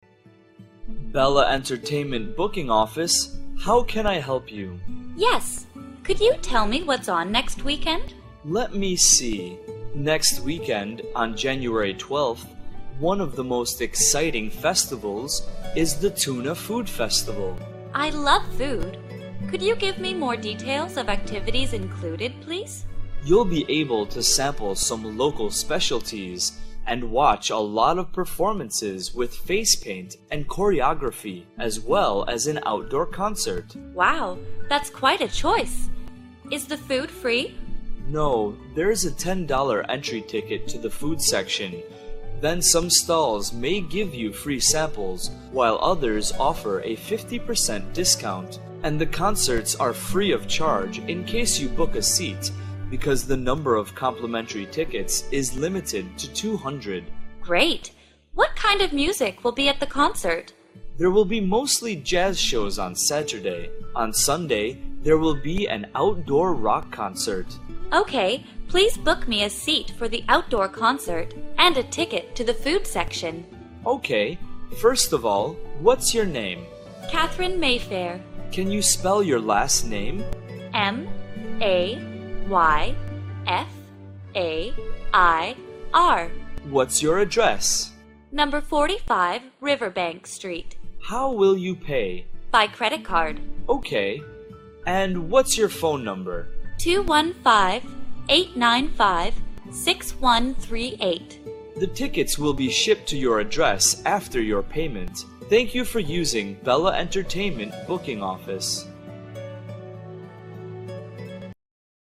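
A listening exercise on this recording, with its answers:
Task: Fill in the missing information.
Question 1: Event name: ________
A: Tuna Food Festival

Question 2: Date: ________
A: January 12th

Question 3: Concert type: ________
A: outdoor rock concert

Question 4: Ticket price: ________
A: $10

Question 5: Customer name: ________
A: Catherine Mayfair

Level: lớp 8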